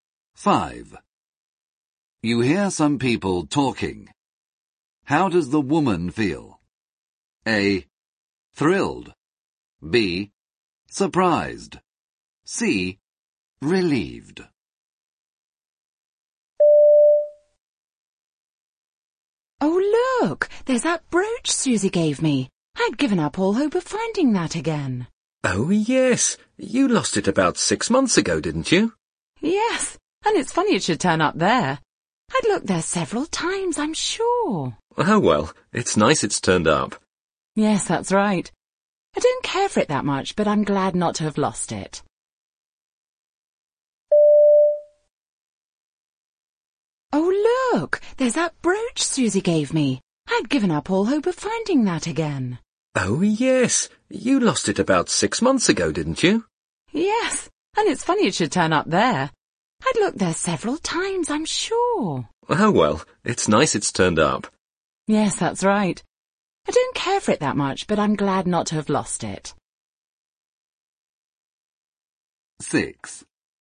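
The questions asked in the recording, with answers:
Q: How does the woman feel?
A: C: Relieved.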